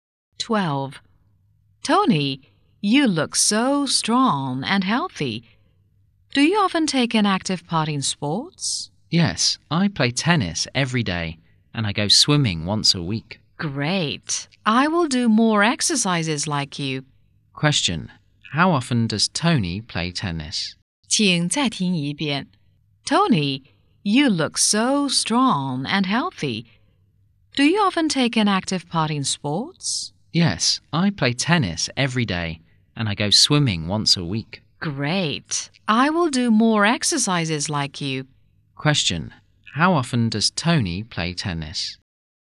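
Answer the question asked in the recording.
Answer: Every day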